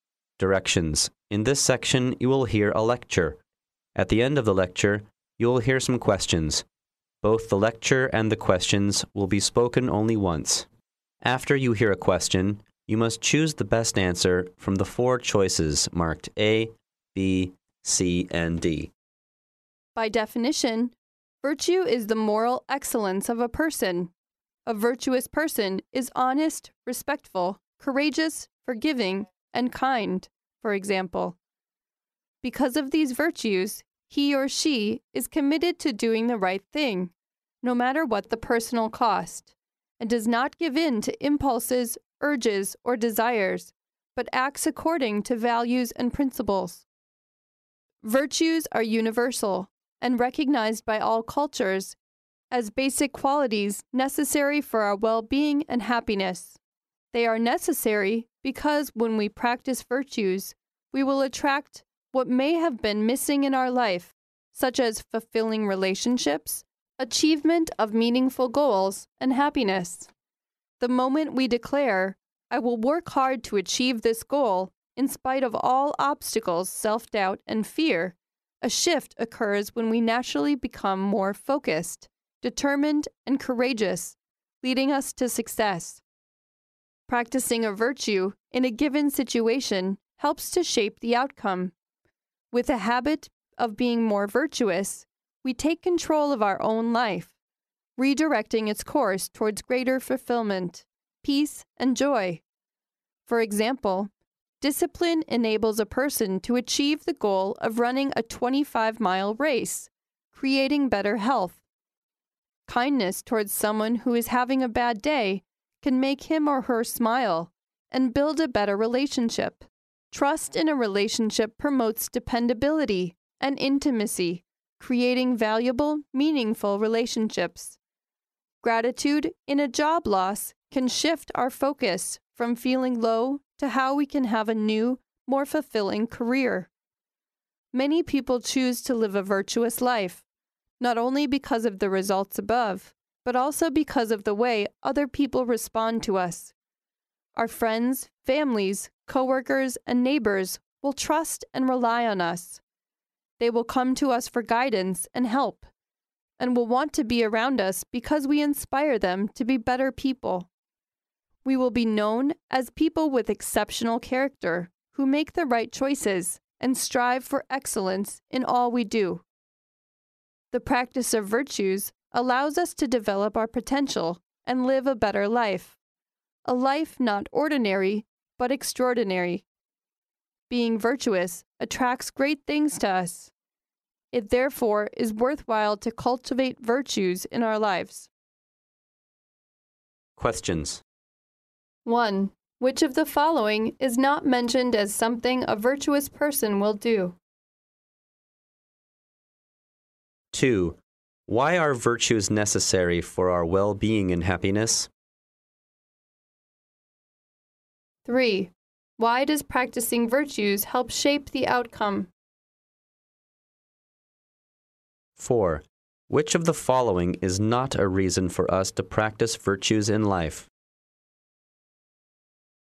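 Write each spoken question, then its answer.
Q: Why are virtues necessary for our well-being and happiness?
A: Practicing them attracts what may be missing in our life, such as fulfilling relationships, meaningful goals and happiness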